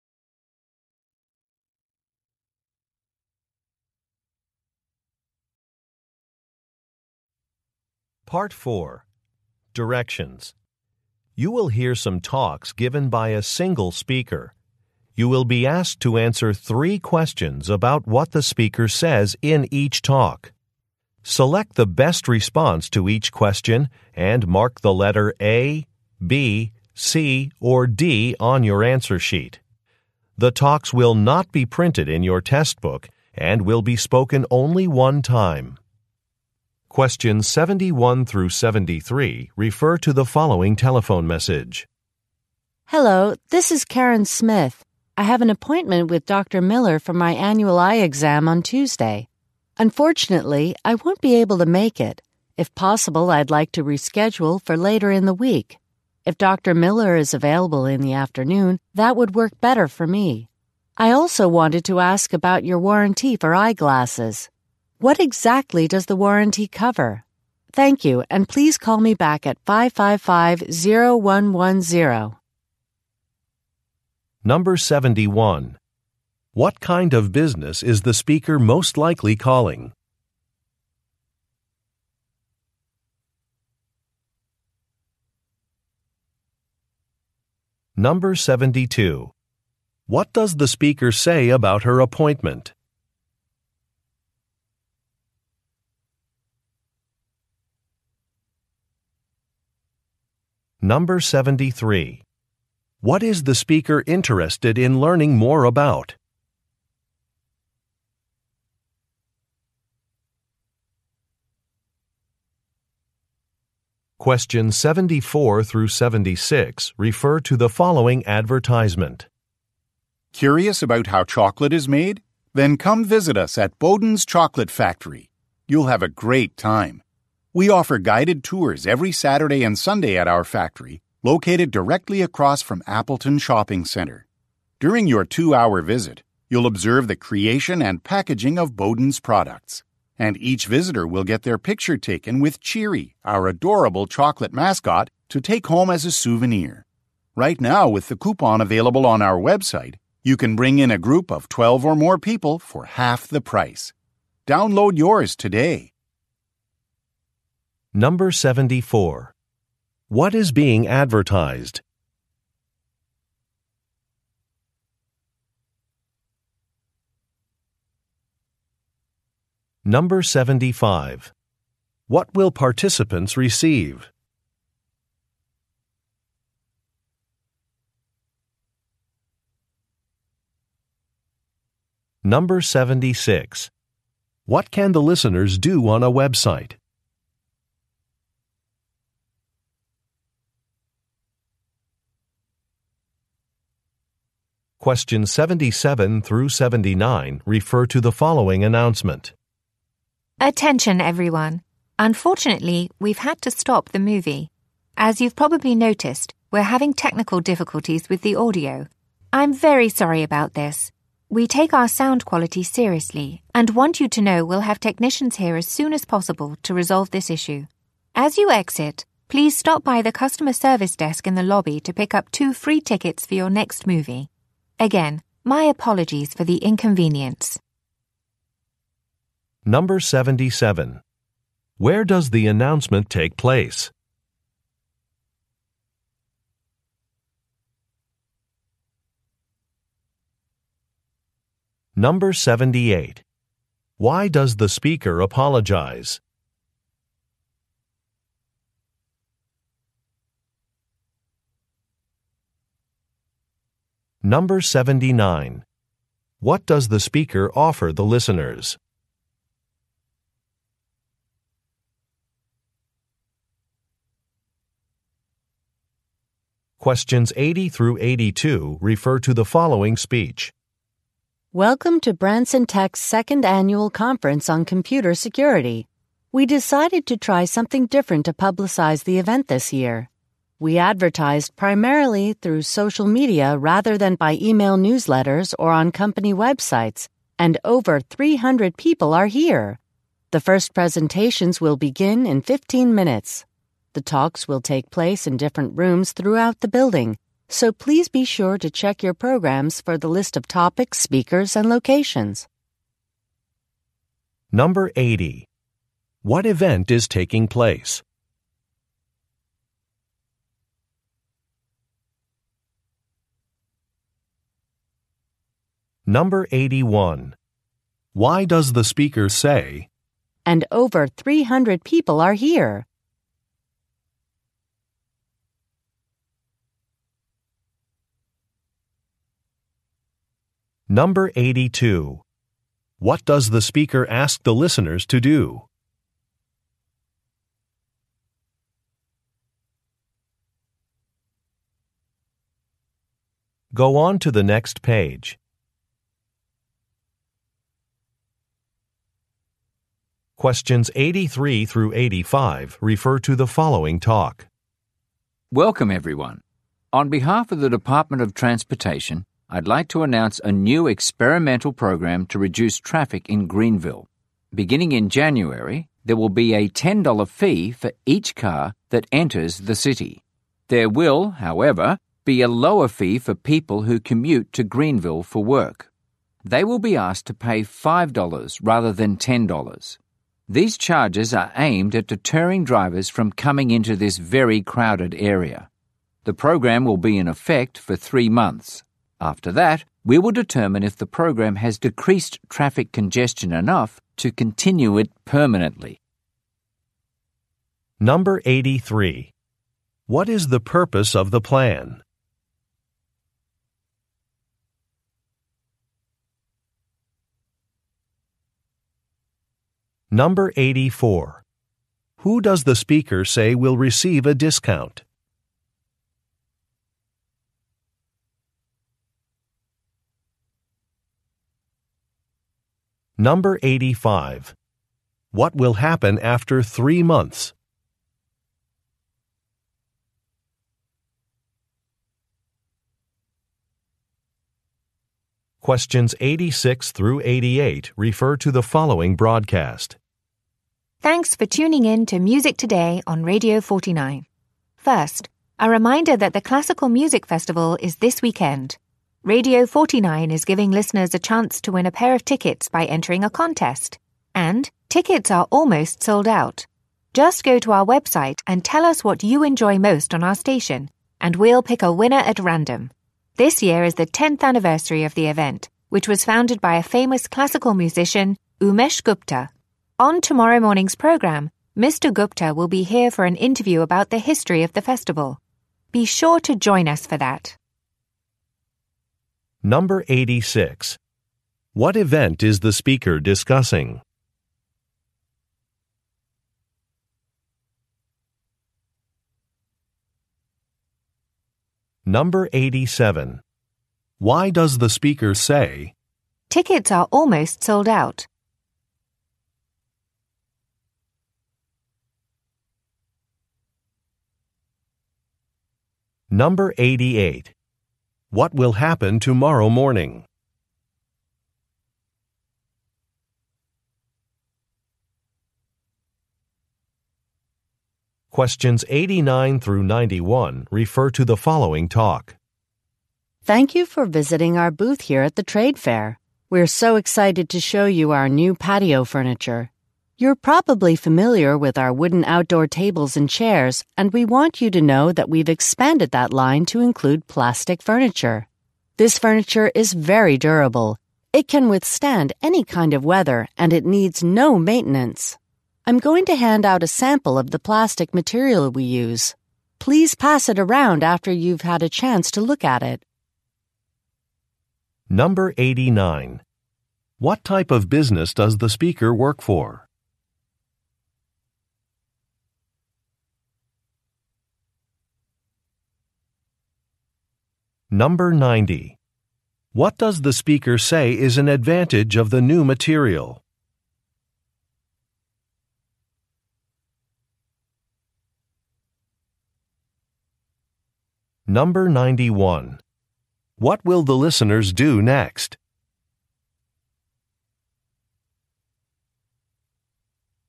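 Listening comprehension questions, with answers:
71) What kind of business is the speaker most likely calling?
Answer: An eye doctor's office

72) What does the speaker say about her appointment?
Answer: She cannot attend and wants to reschedule

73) What is the speaker interested in learning more about?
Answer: The warranty for eyeglasses

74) What is being advertised?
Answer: Chocolate factory tours

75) What will participants receive?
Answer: A photo with the mascot

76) What can the listeners do on a Web site?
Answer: Download a group discount coupon

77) Where does the announcement take place?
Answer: At a movie theater

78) Why does the speaker apologize?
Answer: There are audio problems

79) What does the speaker offer the listeners?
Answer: Two free movie tickets

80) What event is taking place?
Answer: A conference on computer security

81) Why does the speaker say, "And over 300 people are here"?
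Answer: To show the social media advertising was successful

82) What does the speaker ask the listeners to do?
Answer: Check their programs

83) What is the purpose of the plan?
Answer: To reduce traffic

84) Who does the speaker say will receive a discount?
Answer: People who commute to Greenville for work

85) What will happen after three months?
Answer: The program will be evaluated

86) What event is the speaker discussing?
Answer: A classical music festival

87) Why does the speaker say, "tickets are almost sold out"?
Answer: To encourage listeners to enter the contest

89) What type of business does the speaker work for?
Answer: A patio furniture maker

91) What will the listeners do next?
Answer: Look at a sample of the material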